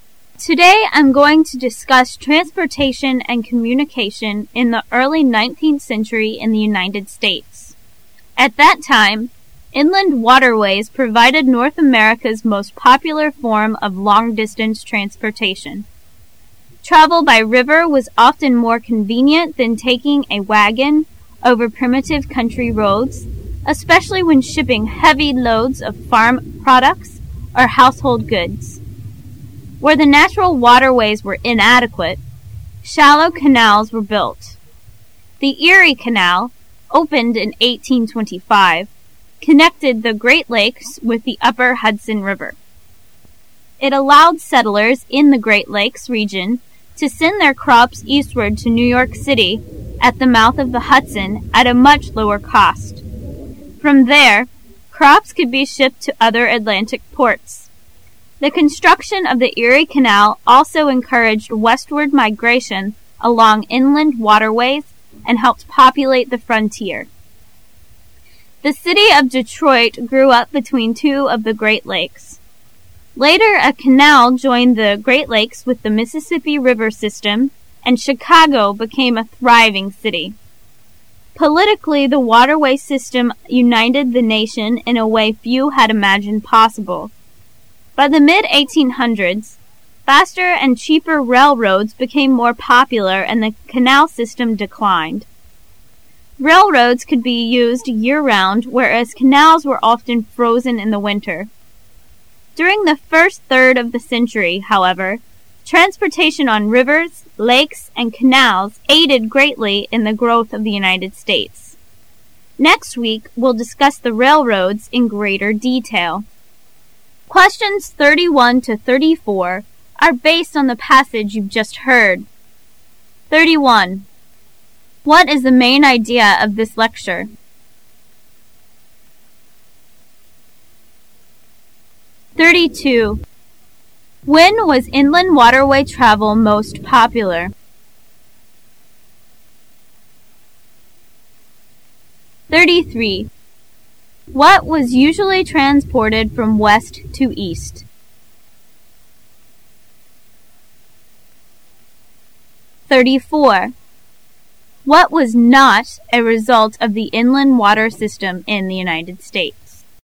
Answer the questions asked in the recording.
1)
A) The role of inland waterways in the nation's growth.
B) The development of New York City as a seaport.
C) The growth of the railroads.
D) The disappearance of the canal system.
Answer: A) The role of inland waterways in the nation's growth.
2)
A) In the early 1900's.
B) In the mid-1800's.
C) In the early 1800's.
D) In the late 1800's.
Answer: C) In the early 1800's.
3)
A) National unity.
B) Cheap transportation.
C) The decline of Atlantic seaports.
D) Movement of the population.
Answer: C) The decline of Atlantic seaports.
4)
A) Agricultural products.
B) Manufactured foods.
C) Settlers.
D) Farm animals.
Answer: A) Agricultural products.

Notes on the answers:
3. What was NOT a result of the inland water system in the United States? [试题分析]本题考查对全文意思的理解和具体细节的把握。 [详细解答]文中提到"The construction of the Erie Canel also encouraged westward migration along inland water ways..."故D项可排除。后文又提到更为廉价和快速的陆运方式,故B也可排除。由于交通的便利,加快全国各地经济,文化的繁荣,故A也可排除,所以答案为C。

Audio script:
A
[解析] 31-34 Today I'm going to discuss transportation and communication in the earthy 19th century in the United States. At that time, inland waterways provided North America's most popular form of long distance transportation. Travel by river was often more convenient than taking a wagon over primitive country roads, especially when shipping heavy loads of farm products or household goods. Where the natural waterways were inadequate, shallow canals were built. The Erie Canal, opened in 1825, connected the Great Lakes with the upper Hudson River. It allowed settlers in the Great Lakes region to send their crops eastward to New York City at the mouth of the Hudson at a much lower cost. From there, crops could be shipped to other Atlantic ports. The construction of the Erie Canal also encouraged westward migration along inland waterways and helped populate the frontier. The City of Detroit grew up between two of the Great Lakes. Later a canal joined the Great Lakes with the Mississippi river system and Chicago became a thriving city. Politically the waterway system united the nation in a way few had imagined possible. By the mid--1800's faster and cheaper railroads became more popular and the canal system declined. Railroads could be used year round whereas canals were often frozen in the winter. During the first third of the century, however, transportation on rivers, lakes and canals aided greatly in the growth of the United States. Next week we'11 discuss the railroads in greater detail. What is the main idea of this lecture?